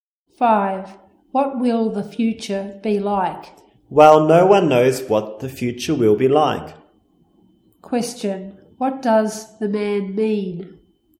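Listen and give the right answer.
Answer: No one knows what the future will be like.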